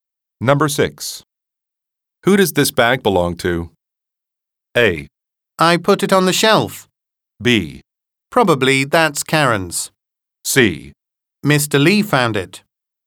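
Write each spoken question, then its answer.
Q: Who does this bag belong to?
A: B: Probably that's Karen's.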